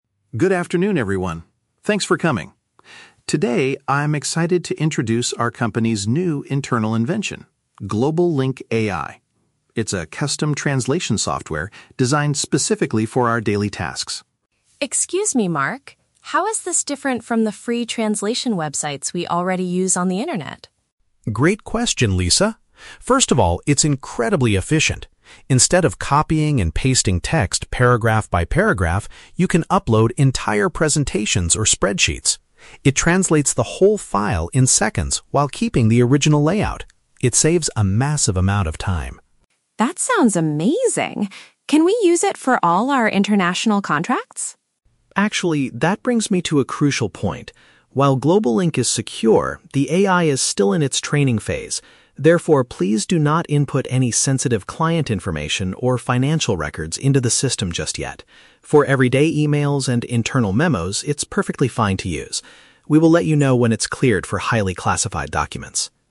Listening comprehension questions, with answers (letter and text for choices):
Listen to an IT specialist introducing a new software to the staff. For each question, choose the correct answer (A, B, or C).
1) What is the main advantage of the new translation software?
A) It is completely free for everyone on the internet to use.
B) It translates spoken conversations during international meetings.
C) It can process whole documents without ruining their design.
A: C) It can process whole documents without ruining their design.

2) What type of information should employees avoid putting into the AI tool?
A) Private details belonging to the company's customers.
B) General messages and internal communications.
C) Large presentations and spreadsheets.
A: A) Private details belonging to the company's customers.

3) Why is there a restriction on using the software for certain files right now?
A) The company's computer network is currently not safe.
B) The artificial intelligence system is still learning.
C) The program frequently makes serious grammar mistakes.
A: B) The artificial intelligence system is still learning.

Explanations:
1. Mark explains that you can "upload entire presentations... while keeping the original layout." Option (C) paraphrases this idea ("process whole documents" for "upload entire presentations", and "without ruining their design" for "keeping the original layout"). Option (A) is a trap; Lisa mentions "free translation websites" to compare, but this new tool is an internal company invention. Option (B) sounds like a cool AI feature but is never mentioned.
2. Mark warns the staff: "please do not input any sensitive client information." Option (A) is a direct paraphrase ("Private details" = "sensitive information", "customers" = "clients"). Option (B) is a trap; Mark says everyday emails and internal memos are "perfectly fine to use." Option (C) is also a trap; Mark encourages uploading presentations and spreadsheets to save time.
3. Mark states the reason for the restriction is that "the AI is still in its training phase." Option (B) uses synonyms ("learning" for "in its training phase"). Option (A) is a trap; Mark explicitly says "While GlobalLink is secure..." (meaning it is safe). Option (C) is a plausible worry about AI, but Mark does not mention grammar mistakes in the audio.

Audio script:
Mark: Good afternoon, everyone. Thanks for coming. Today, I'm excited to introduce our company's new internal invention: "GlobalLink AI." It's a custom translation software designed specifically for our daily tasks.
Lisa: Excuse me, Mark. How is this different from the free translation websites we already use on the internet?
Mark: Great question, Lisa. First of all, it's incredibly efficient. Instead of copying and pasting text paragraph by paragraph, you can upload entire presentations or spreadsheets. It translates the whole file in seconds while keeping the original layout. It saves a massive amount of time.
Lisa: That sounds amazing. Can we use it for all our international contracts?
Mark: Actually, that brings me to a crucial point. While GlobalLink is secure, the AI is still in its training phase. Therefore, please do not input any sensitive client information or financial records into the system just yet. For everyday emails and internal memos, it's perfectly fine to use. We will let you know when it's cleared for highly classified documents.